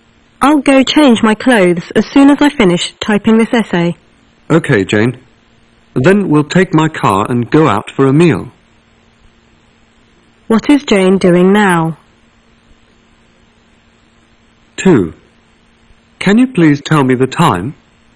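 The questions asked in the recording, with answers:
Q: What is Jane doing now?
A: Typing an essay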